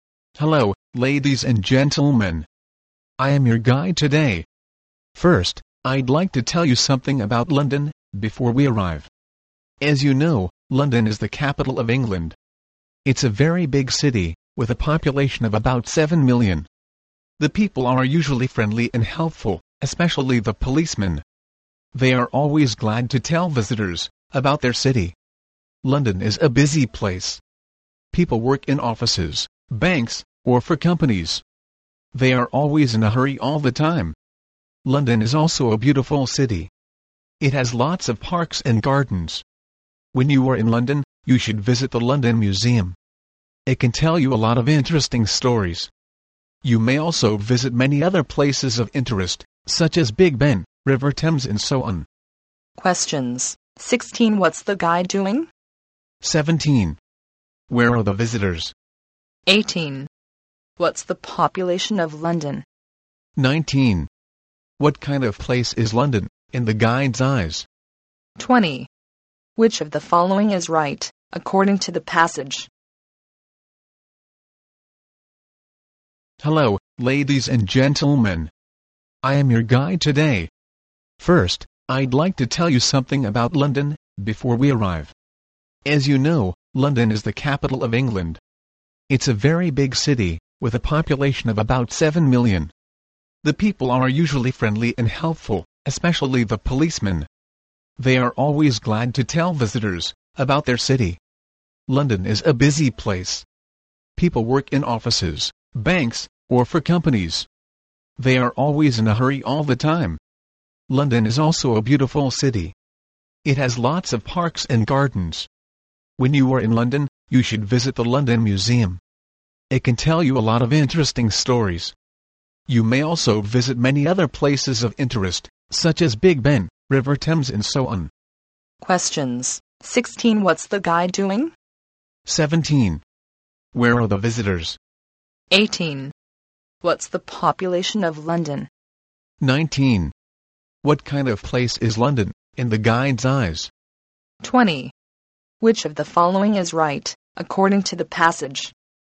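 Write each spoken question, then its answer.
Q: What's the guide doing?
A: Telling visitors about London

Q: What's the population of London?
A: About 7 million

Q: What kind of place is London, in the guide's eyes?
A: Busy and beautiful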